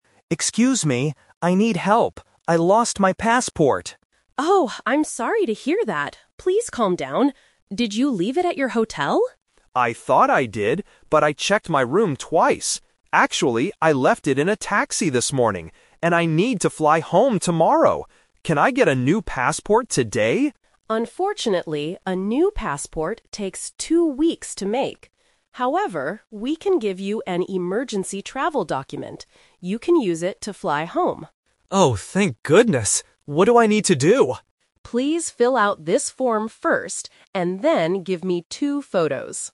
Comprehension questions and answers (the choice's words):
Listen to the conversation and circle the correct answer (A, B, or C).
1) Where did the man leave his passport?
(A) At his hotel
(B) At the airport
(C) In a taxi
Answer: In a taxi

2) What will the embassy give the man today?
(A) A new passport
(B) An emergency travel document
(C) A new plane ticket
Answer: An emergency travel document

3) What does the staff ask the man to provide?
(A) Two photos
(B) A taxi receipt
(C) Some money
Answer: Two photos

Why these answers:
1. This is "The Twist". The staff asks if he left it at the hotel (Option A - Trap), and Leo says he thought so too, but then confirms: "Actually, I left it in a taxi this morning." Option (B) is a trap because he mentions flying home tomorrow, which relates to the airport, but he didn't lose it there.
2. Leo asks for a new passport (Option A - Trap), but Maria says it takes two weeks. Instead, she says, "we can give you an emergency travel document." Option (C) is plausible for a travel emergency but is not mentioned in the audio.
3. At the end of the conversation, Maria tells Leo to fill out a form and "give me two photos." Option (B) is a trap related to the taxi. Option (C) is a common requirement in real life but is not mentioned in this audio.

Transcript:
Leo (Tourist): Excuse me. I need help. I lost my passport!
Maria (Embassy Staff): Oh, I'm sorry to hear that. Please calm down. Did you leave it at your hotel?
Leo: I thought I did, but I checked my room twice. Actually, I left it in a taxi this morning. And I need to fly home tomorrow! Can I get a new passport today?
Maria: Unfortunately, a new passport takes two weeks to make. However, we can give you an emergency travel document. You can use it to fly home.
Leo: Oh, thank goodness. What do I need to do?